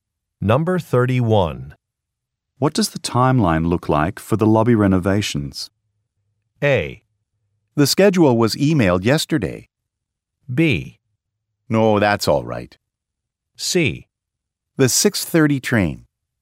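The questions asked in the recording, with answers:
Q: What does the timeline look like for the lobby renovations?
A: A: The schedule was emailed yesterday.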